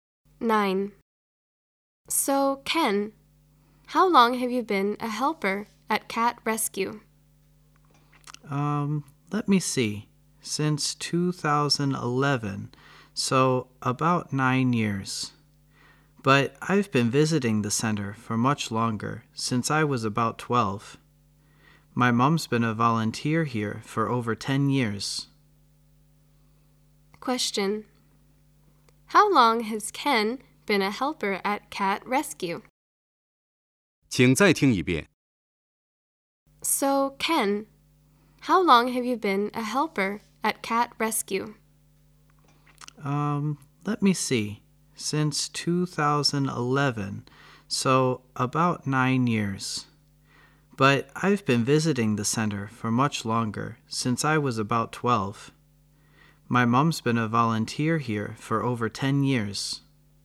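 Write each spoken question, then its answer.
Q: How long has Ken been a helper at Cat Rescue?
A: About 9 years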